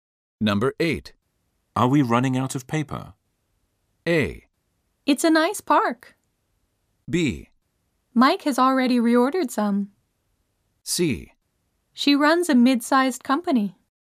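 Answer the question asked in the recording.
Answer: B: Mike has already reordered some.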